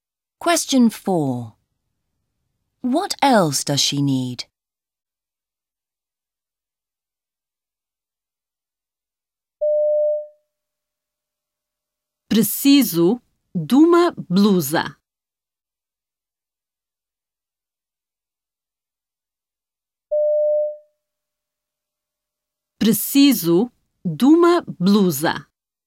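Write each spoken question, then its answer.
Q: What else does she need?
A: A blouse (blusa)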